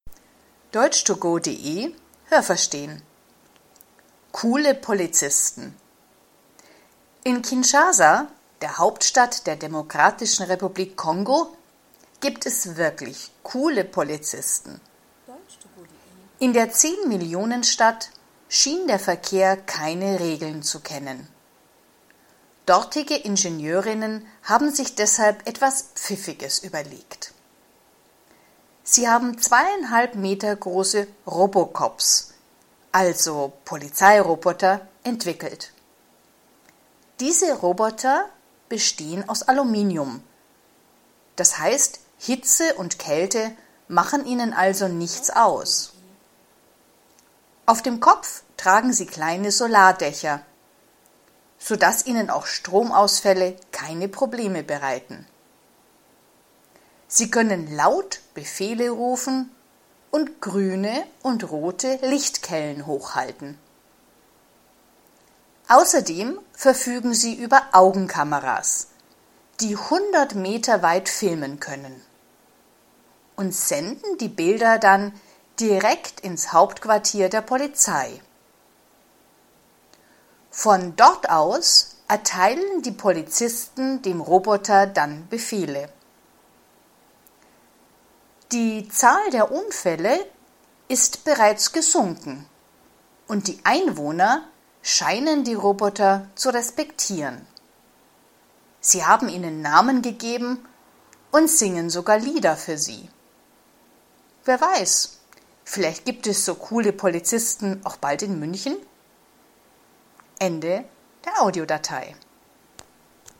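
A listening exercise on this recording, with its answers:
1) In Kinshasa gibt es zehn Millionen Polizisten.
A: falsch

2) Frauen in der Demokratischen Republik Kongo haben Polizeiroboter entwickelt.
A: richtig

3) Die Roboter sind 2,50 m breit.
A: falsch

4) Die Roboter sind aus Aluminium.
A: richtig

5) Die Roboter funktionieren nur, wenn es Strom gibt.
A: falsch

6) Die Roboter können alles filmen, was bis zu 100 m weit entfernt von ihnen passiert.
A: richtig

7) Die Roboter können selber entscheiden, welche Befehle sie rufen.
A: falsch

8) Seit die Roboter eingesetzt werden, gibt es weniger Unfälle.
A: richtig

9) Die Roboter können auch singen.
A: falsch

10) Auch in München gibt es schon solche Roboter auf den Straßen.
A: falsch

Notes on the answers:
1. Es gibt 10 Millionen Einwohner.
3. Sie sind 2,50 m groß.
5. Wenn es keinen Strom gibt, funktionieren die Roboter trotzdem, weil sie kleine Solardächer auf dem Kopf tragen.
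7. Sie erhalten die Befehle vom Hauptquartier der Polizei.
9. Die Einwohner singen Lieder für die Roboter.
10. Der letzte Satz ist nur eine Vermutung. Das könnte vielleicht passieren.

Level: B (mittel)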